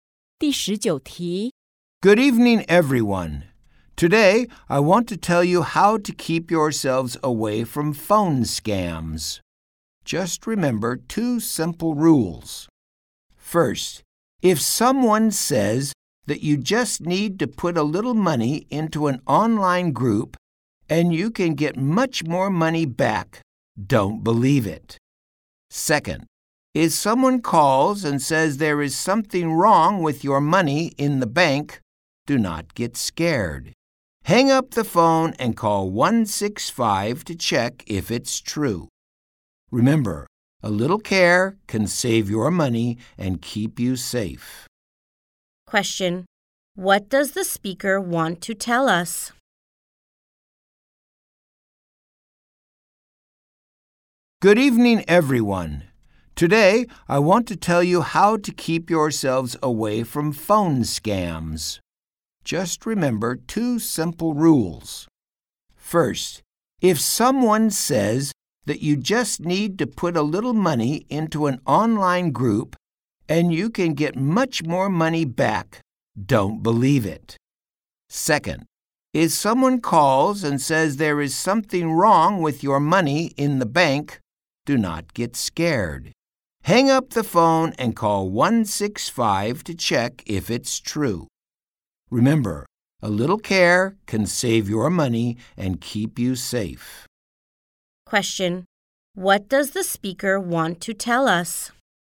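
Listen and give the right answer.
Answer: How to keep away from phone scams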